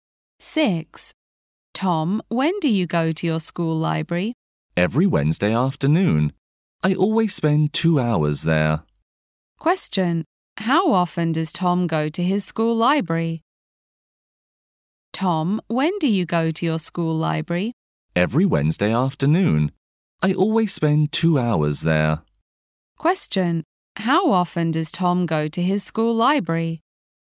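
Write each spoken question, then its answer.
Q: How often does Tom go to his school library?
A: Once a week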